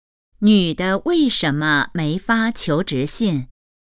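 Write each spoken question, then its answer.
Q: 女的为什么没发求职信?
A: 专业不太符合要求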